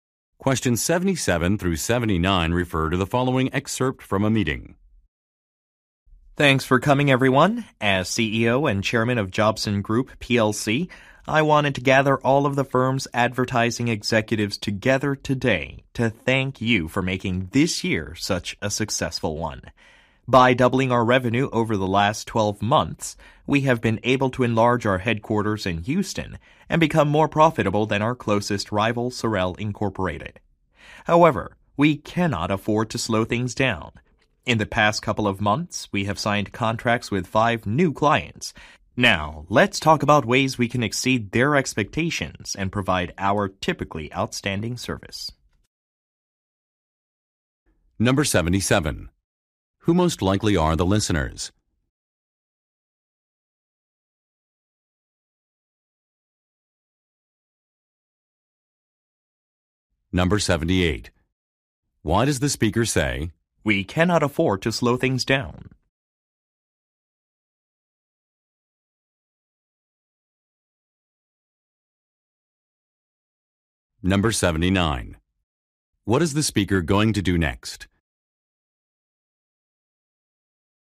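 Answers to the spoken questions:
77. Advertising executives
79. Discuss ways to exceed new clients' expectations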